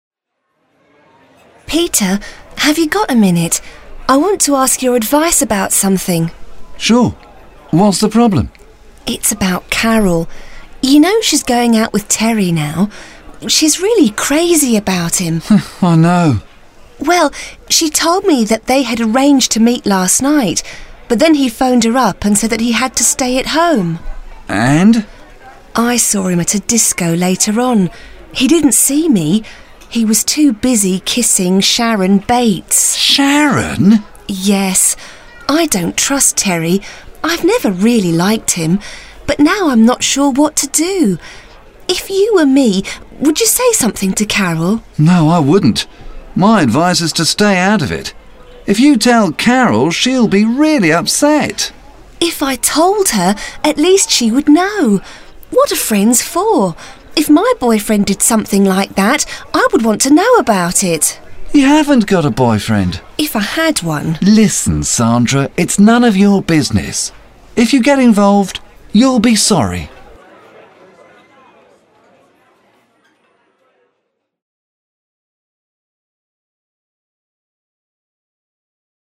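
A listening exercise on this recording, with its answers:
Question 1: Who is talking to whom?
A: Sandra is talking to Peter

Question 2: What are they talking about?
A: Whether Sandra should tell Carol that she saw Terry kissing Sharon Bates

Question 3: Who are they talking about?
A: Carol and her boyfriend Terry

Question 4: Have they got a problem?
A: Yes, Sandra doesn't know whether to tell Carol

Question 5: Do they agree about a possible solution or have they got a different opinion?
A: They have different opinions: Peter says stay out of it, Sandra wants to tell Carol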